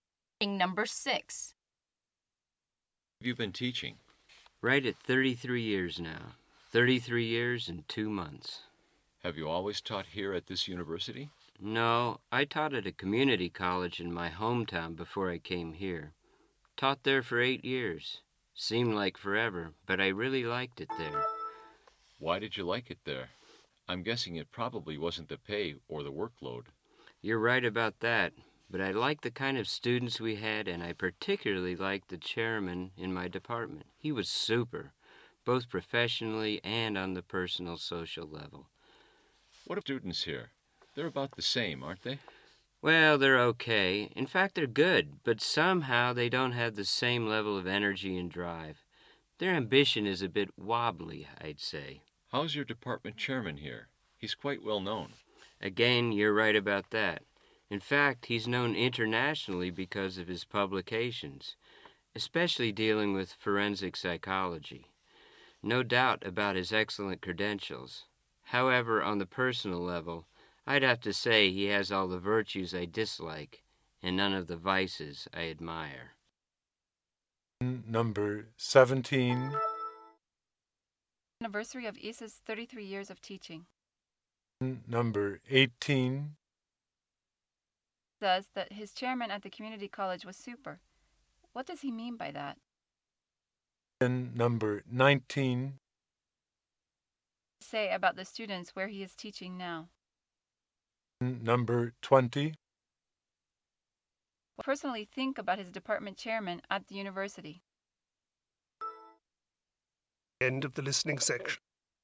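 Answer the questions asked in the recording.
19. They are good but lack energy and drive
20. He dislikes him on a personal level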